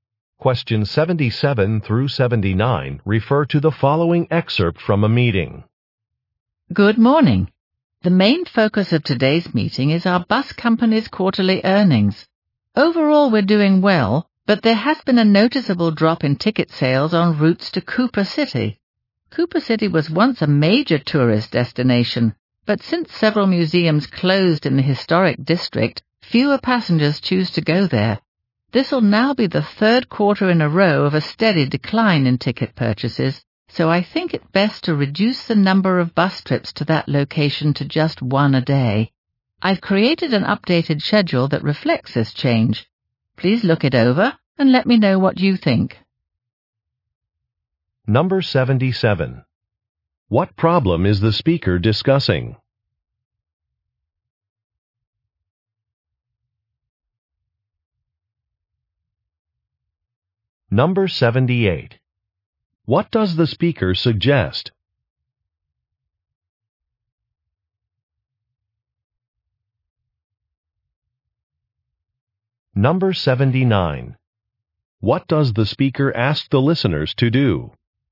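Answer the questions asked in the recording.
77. A drop in ticket sales on routes to Cooper City
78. Reducing bus trips to Cooper City to one a day
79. Review an updated schedule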